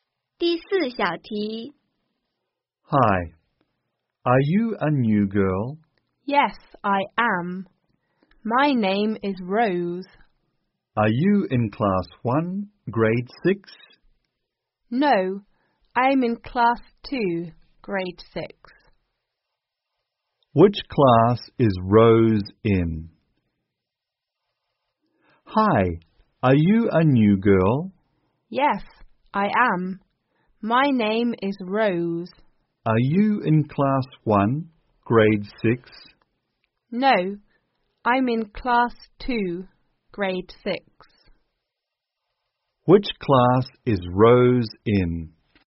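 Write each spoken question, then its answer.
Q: Which class is Rose in?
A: Class 2, Grade 6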